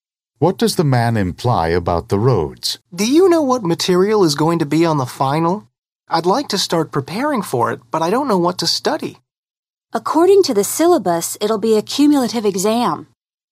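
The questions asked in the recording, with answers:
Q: What does the woman mean?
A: The exam will cover all the course material.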